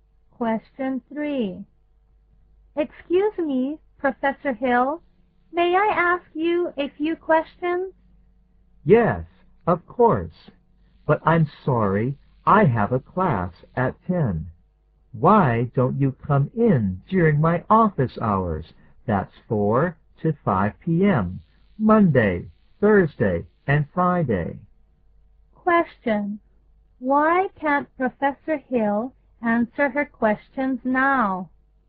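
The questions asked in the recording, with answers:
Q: Why can't Professor Hill answer her questions now?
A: He has a class at 10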